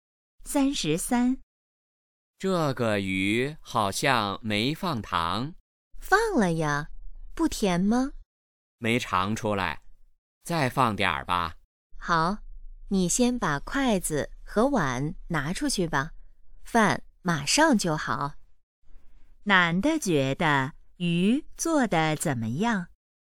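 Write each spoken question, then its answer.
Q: 男的觉得鱼做得怎么样?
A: 不够甜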